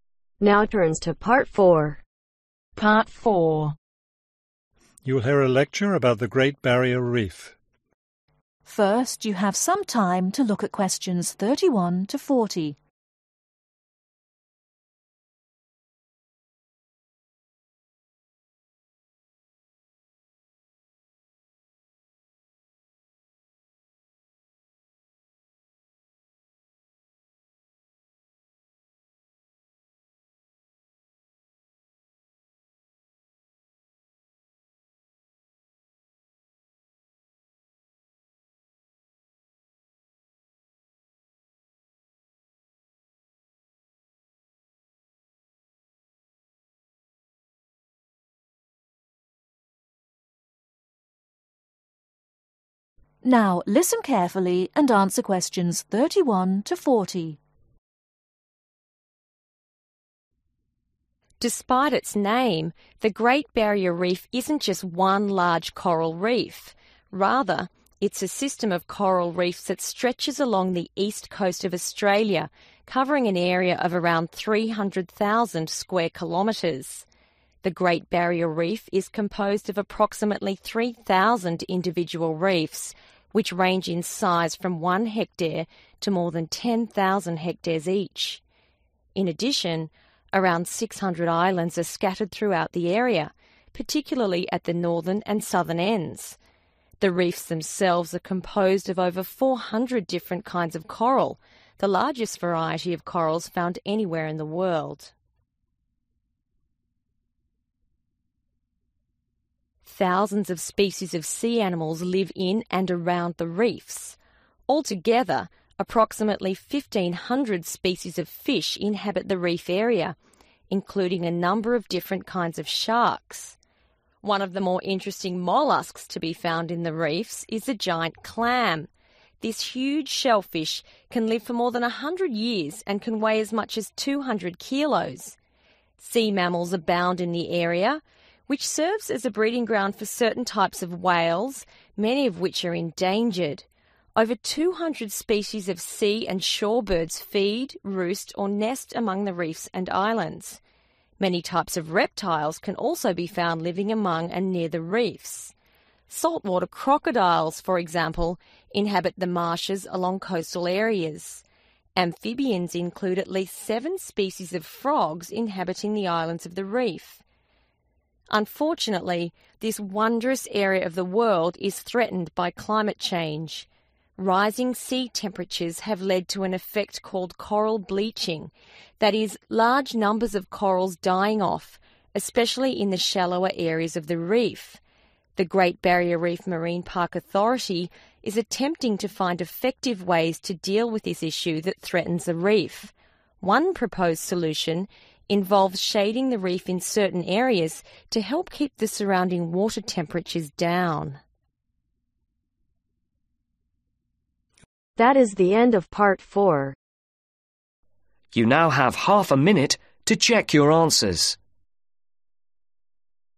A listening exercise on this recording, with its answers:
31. The Great Barrier Reef is made up of 3,000 (31) .............. reefs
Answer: individual

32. and 600 (32) .............. .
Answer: islands

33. Over 400 kinds of (33) ................. can be found there.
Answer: coral(s)

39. Coral bleaching rising sea ................. .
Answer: temperatures

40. One response to this problem ................ the reef certain area.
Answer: shading